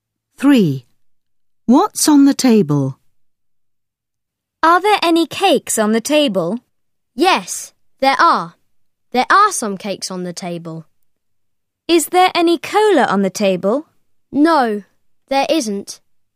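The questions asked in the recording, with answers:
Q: What's on the table?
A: Some cakes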